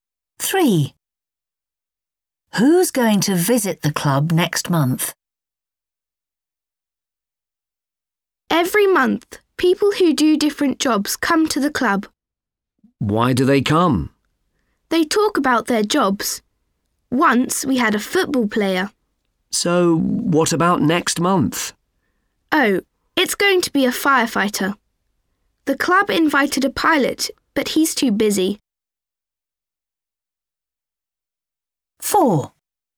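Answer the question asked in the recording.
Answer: a firefighter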